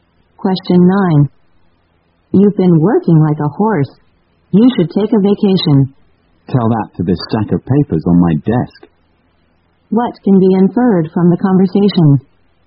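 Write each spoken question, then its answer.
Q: What can be inferred from the conversation?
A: The speaker is too busy with work to take a vacation.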